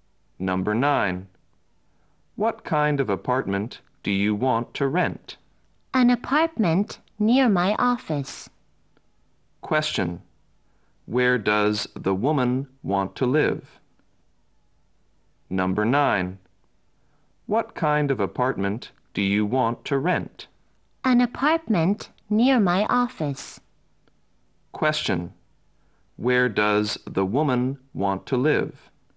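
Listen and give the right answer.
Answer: In an apartment near her office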